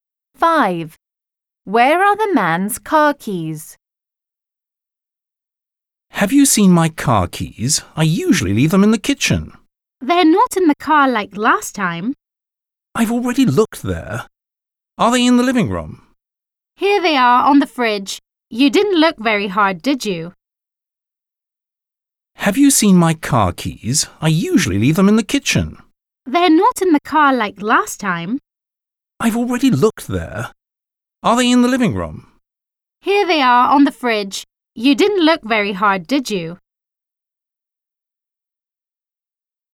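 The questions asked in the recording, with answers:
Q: Where are the man's car keys?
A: On the fridge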